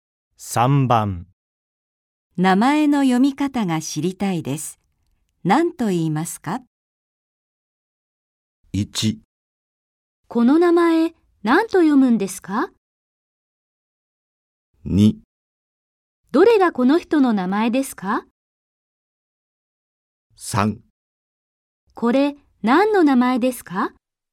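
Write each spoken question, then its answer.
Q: 名前の読み方が知りたいです。何と言いますか?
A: 1: この名前、何と読むんですか?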